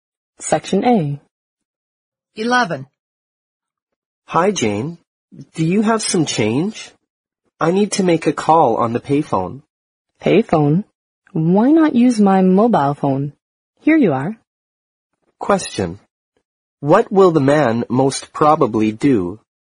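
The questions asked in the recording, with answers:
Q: What will the man most probably do?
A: Make the call on the woman's mobile phone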